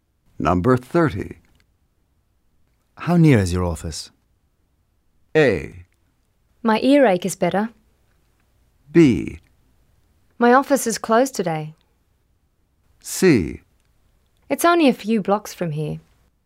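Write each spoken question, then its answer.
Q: How near is your office?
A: C: It's only a few blocks from here.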